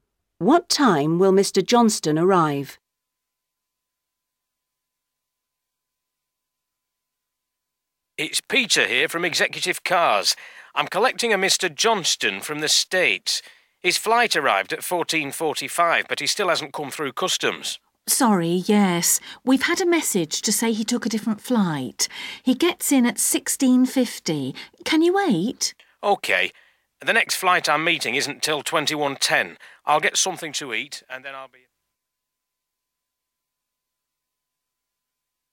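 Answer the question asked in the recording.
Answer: 16:50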